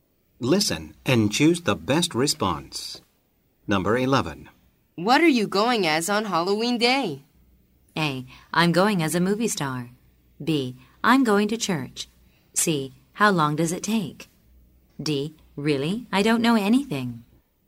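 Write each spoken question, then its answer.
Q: What are you going as on Halloween Day?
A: A: I'm going as a movie star.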